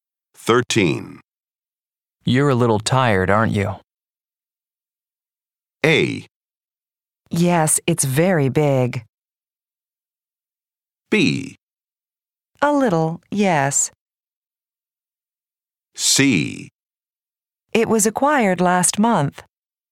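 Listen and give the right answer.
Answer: B: A little, yes.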